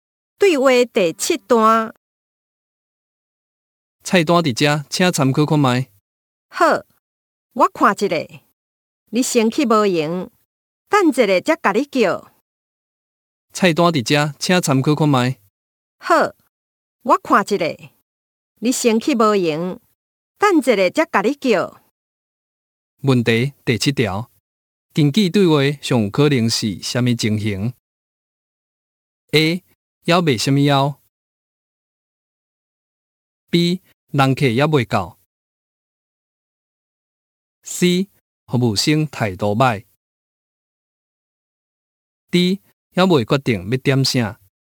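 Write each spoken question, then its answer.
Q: 根据对话,上有可能是什么情形 ?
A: D: 要未决定要点啥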